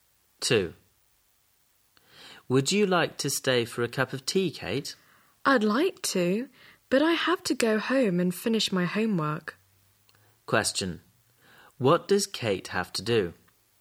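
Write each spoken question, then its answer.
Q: What does Kate have to do?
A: Go home and finish her homework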